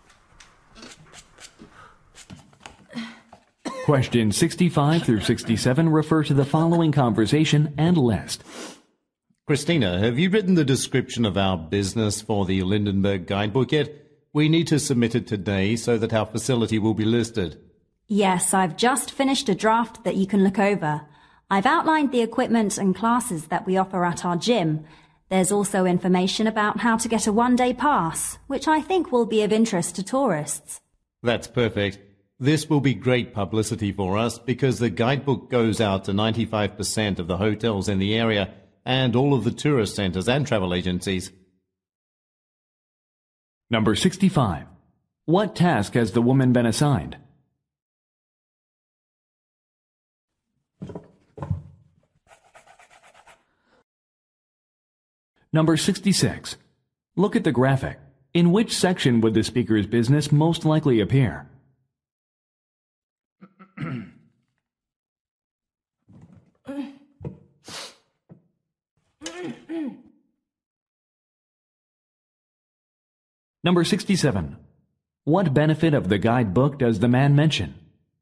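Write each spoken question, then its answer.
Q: What task has the woman been assigned?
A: Writing a description of the business for a guidebook

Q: What benefit of the guidebook does the man mention?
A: It goes out to most hotels, tourist centers and travel agencies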